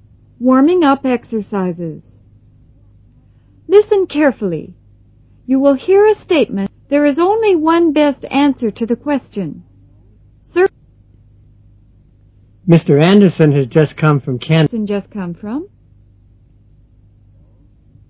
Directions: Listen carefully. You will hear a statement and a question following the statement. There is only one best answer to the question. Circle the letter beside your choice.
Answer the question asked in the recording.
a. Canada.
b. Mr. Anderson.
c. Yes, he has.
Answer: a. Canada.

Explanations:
Mr. Anderson has just come from Canada.